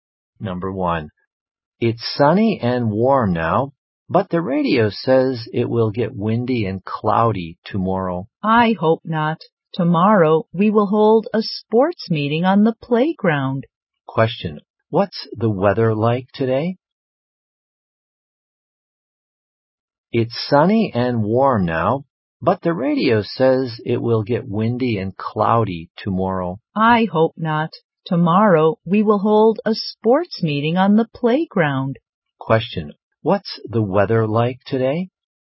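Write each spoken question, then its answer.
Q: what's the weather like today?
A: Sunny and warm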